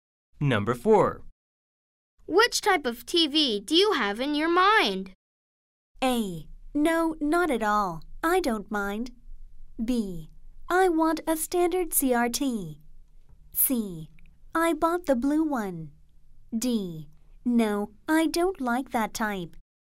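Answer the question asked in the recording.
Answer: B: I want a standard CRT.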